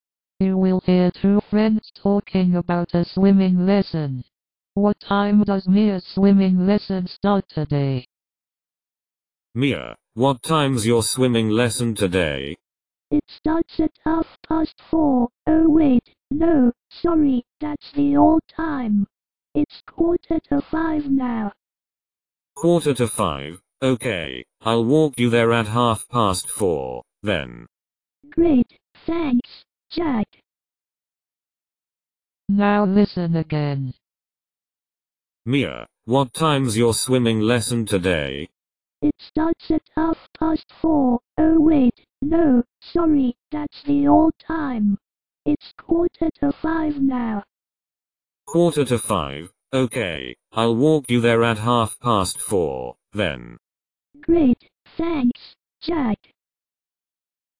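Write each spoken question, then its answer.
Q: What time does Mia's swimming lesson start today?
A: 4:45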